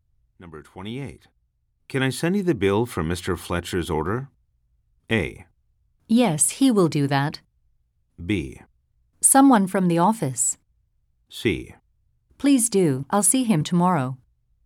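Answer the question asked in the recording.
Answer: C: Please do. I'll see him tomorrow.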